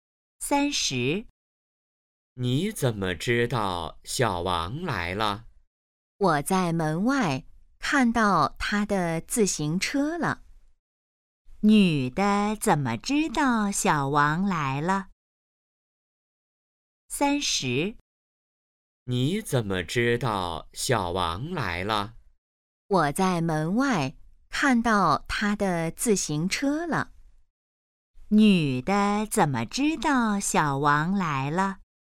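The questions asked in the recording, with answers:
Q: 女的怎么知道小王来了?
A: 在门外看到了他的自行车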